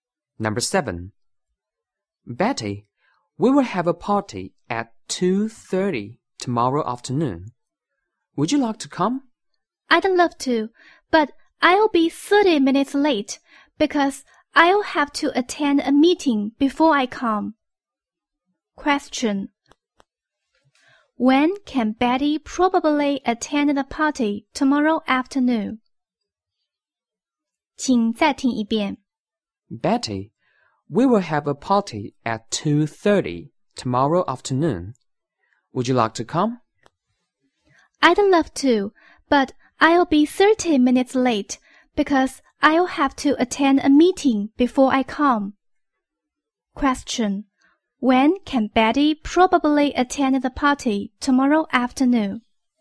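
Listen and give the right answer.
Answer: At 3:00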